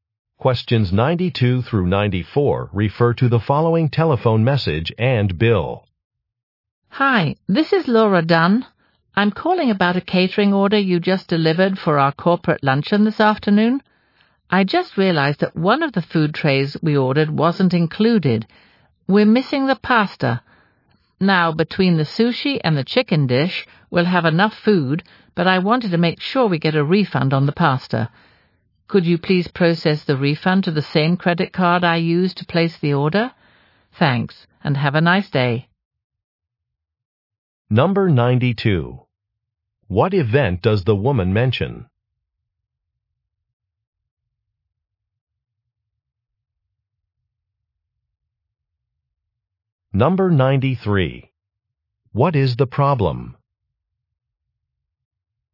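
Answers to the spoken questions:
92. A corporate luncheon.
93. The pasta tray was missing from the order.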